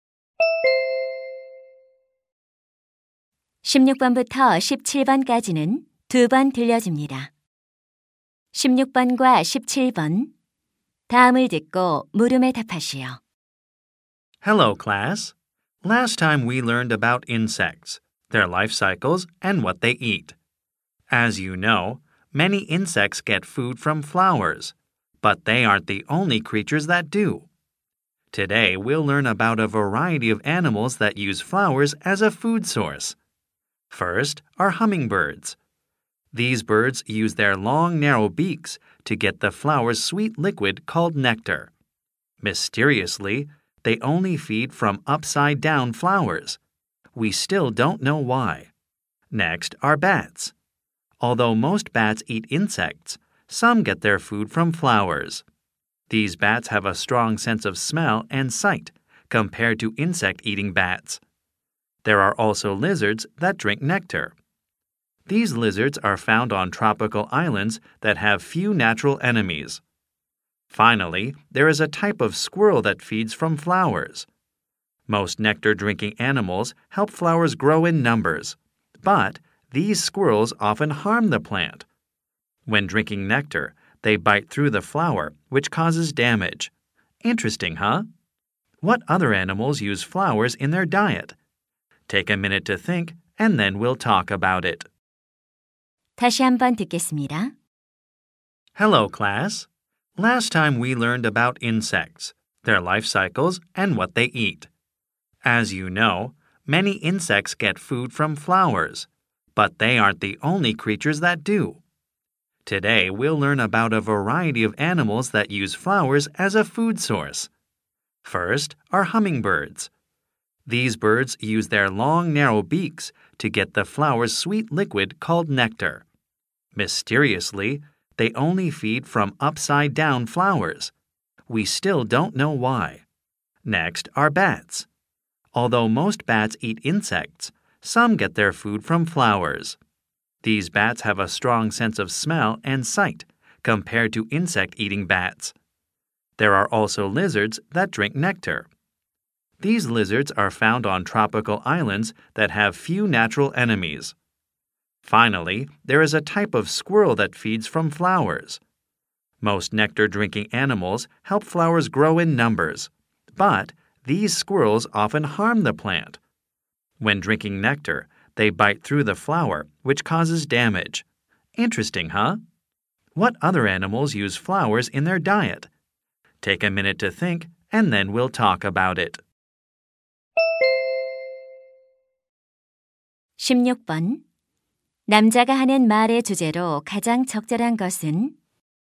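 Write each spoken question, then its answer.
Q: 남자가 하는 말의 주제로 가장 적절한 것은?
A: 꽃을 먹이원으로 이용하는 다양한 동물들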